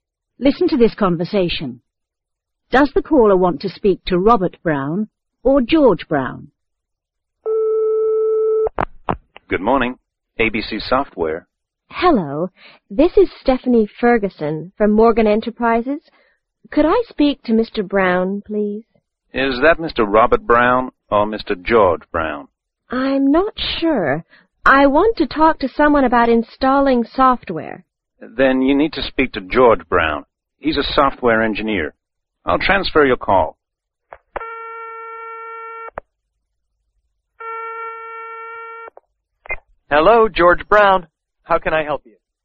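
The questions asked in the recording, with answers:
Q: Does the caller want to speak to Robert Brown or George Brown?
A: George Brown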